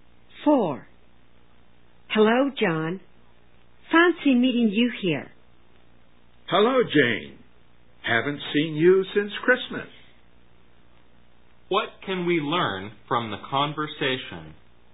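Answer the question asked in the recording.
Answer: They have not seen each other since Christmas and met by chance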